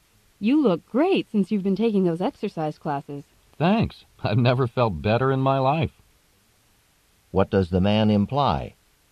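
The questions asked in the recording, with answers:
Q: What does the man imply?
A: The exercise classes have made him feel better than ever.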